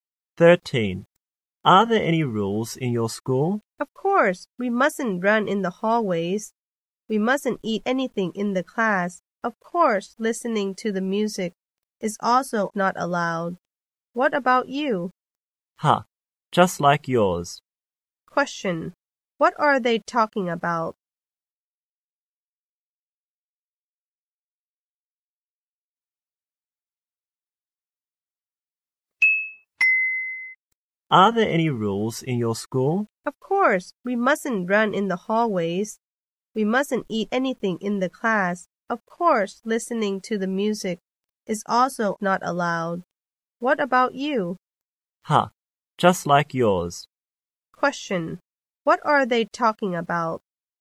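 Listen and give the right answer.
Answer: School rules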